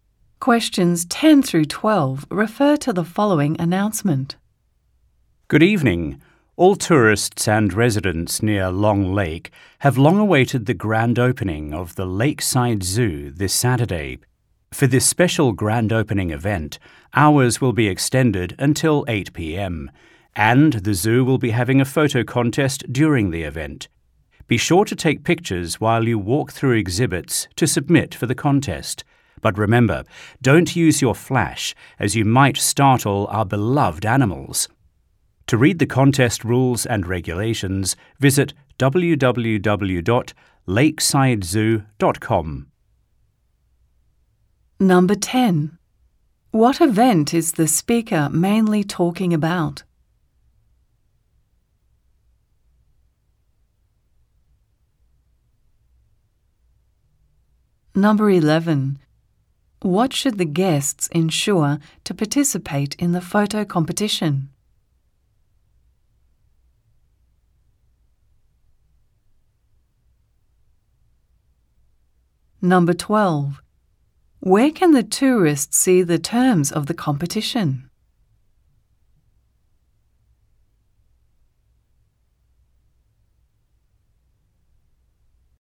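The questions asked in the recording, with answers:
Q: What event is the speaker mainly talking about?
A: The grand opening of the Lakeside Zoo

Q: Where can the tourists see the terms of the competition?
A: On the website www.lakesidezoo.com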